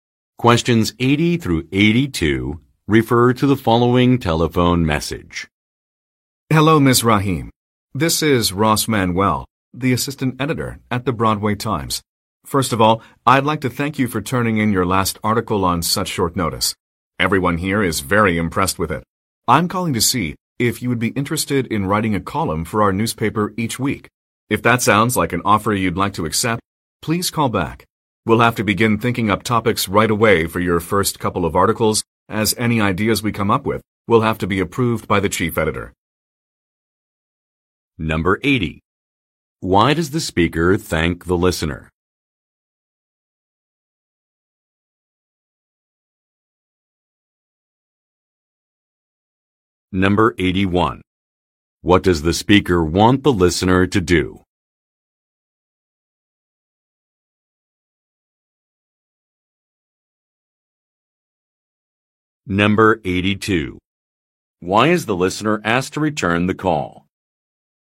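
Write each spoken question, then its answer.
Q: Why does the speaker thank the listener?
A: For turning in her last article on short notice

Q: What does the speaker want the listener to do?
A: Write a weekly column for the newspaper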